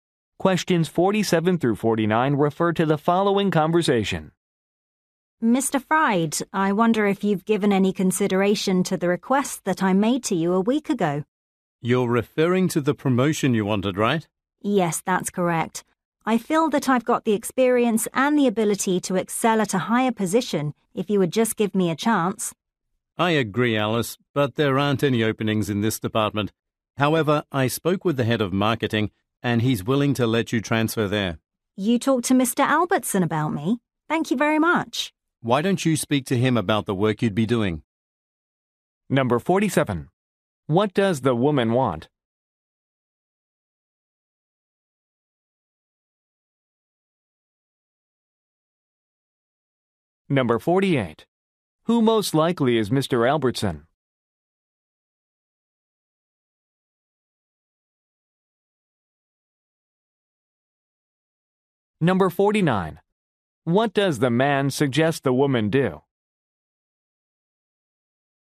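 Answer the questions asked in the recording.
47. A promotion
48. The head of marketing
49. Talk to Mr. Albertson about the work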